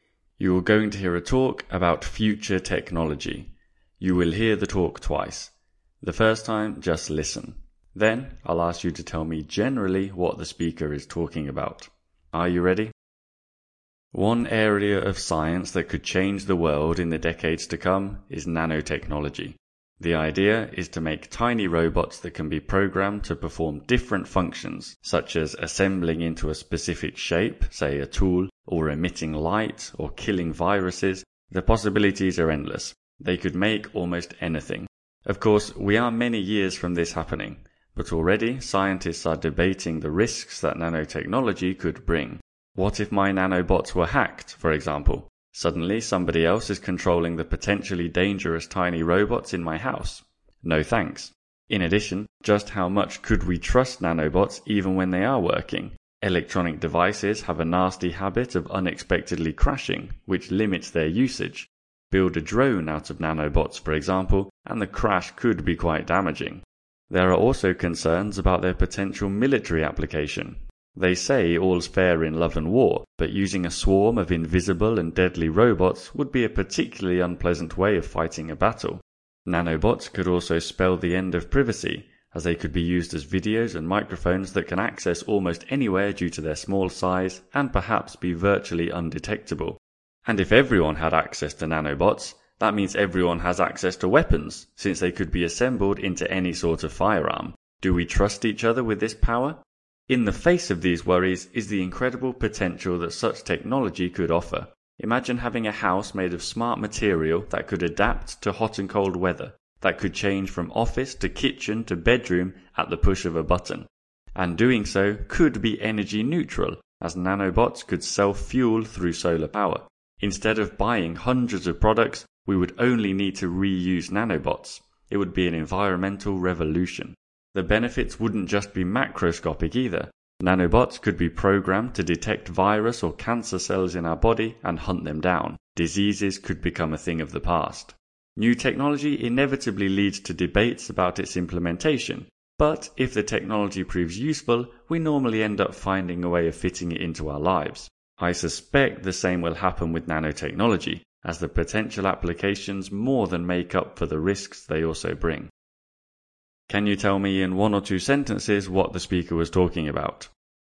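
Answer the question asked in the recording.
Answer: The risks and potential benefits of nanotechnology (tiny programmable robots) in the future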